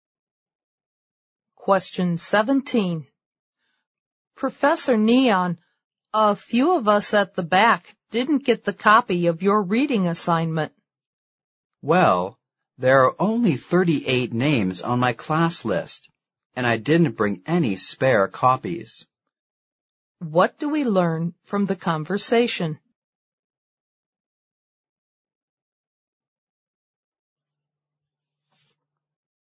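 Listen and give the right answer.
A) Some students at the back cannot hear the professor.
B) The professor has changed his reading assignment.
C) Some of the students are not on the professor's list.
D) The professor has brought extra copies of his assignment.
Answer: C) Some of the students are not on the professor's list.

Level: 四级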